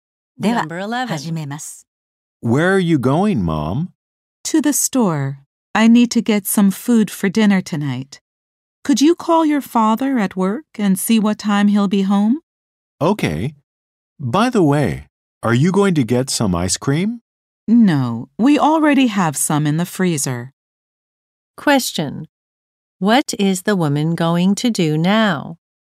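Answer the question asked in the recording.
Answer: Go to the store to buy food for dinner.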